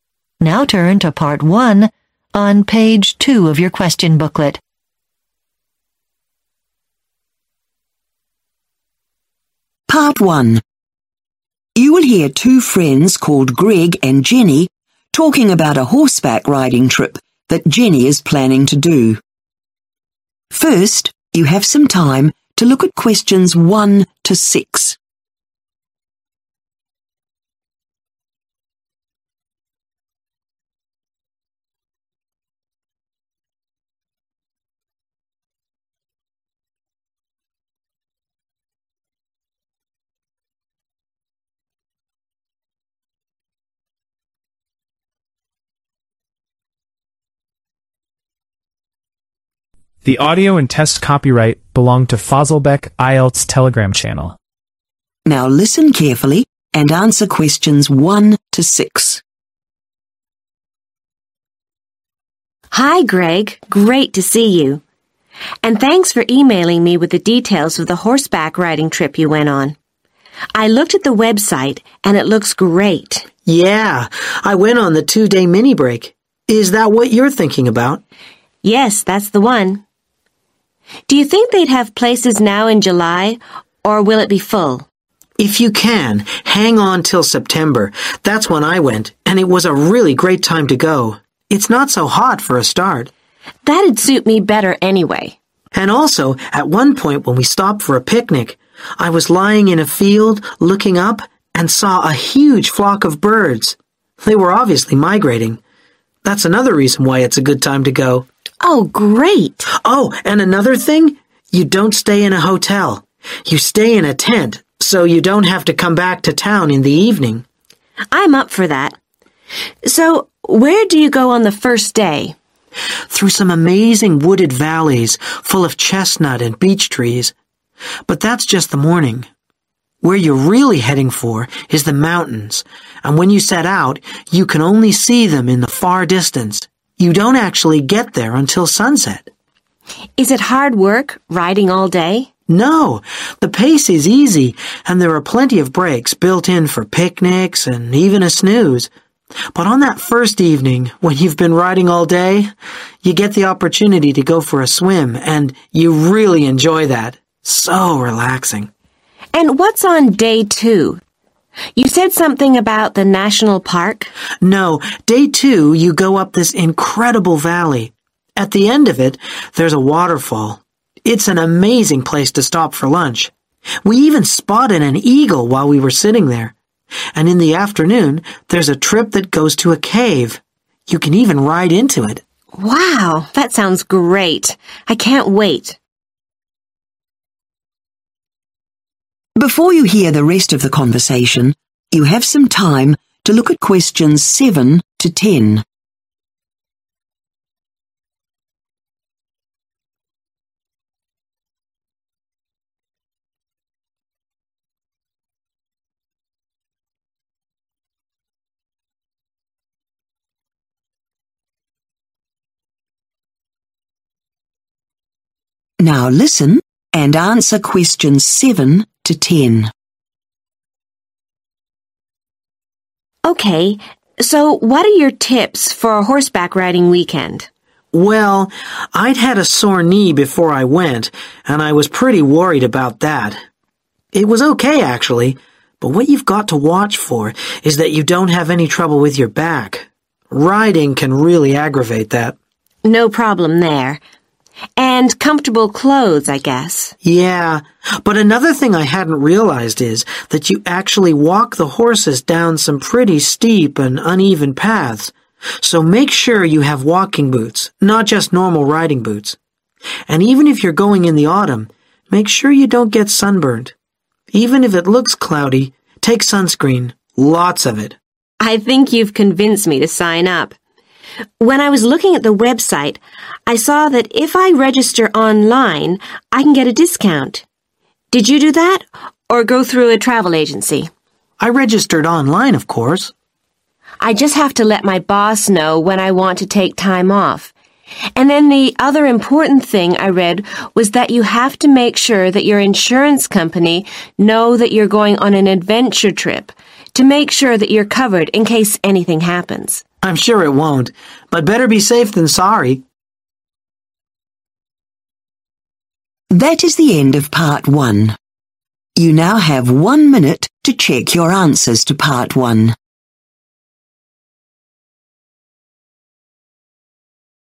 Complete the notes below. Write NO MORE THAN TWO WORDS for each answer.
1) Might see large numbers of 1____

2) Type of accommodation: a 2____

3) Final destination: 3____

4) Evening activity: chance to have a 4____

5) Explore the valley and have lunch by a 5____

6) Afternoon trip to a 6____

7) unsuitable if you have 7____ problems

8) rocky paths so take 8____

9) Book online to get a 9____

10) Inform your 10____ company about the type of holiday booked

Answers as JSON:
{"1": "birds", "2": "tent", "3": "mountains", "4": "swim", "5": "waterfall", "6": "cave", "7": "back", "8": "walking boots", "9": "discount", "10": "insurance"}